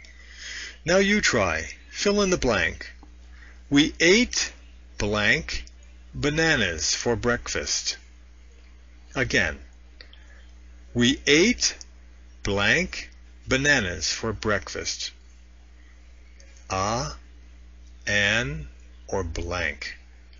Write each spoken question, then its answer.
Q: We ate blank bananas for breakfast.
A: We ate bananas for breakfast.